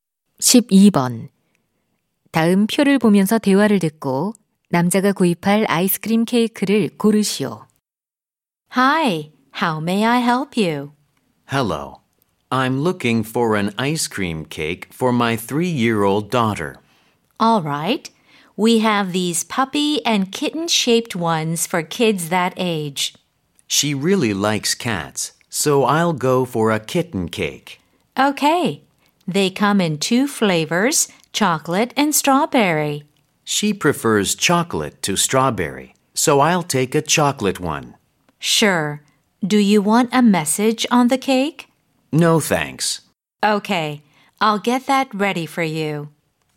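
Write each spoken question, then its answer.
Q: 다음 표를 보면서 대화를 듣고 남자가 구입할 아이스크림 케이크를 고르시오.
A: 메시지 없는 초콜릿 맛 고양이 모양 케이크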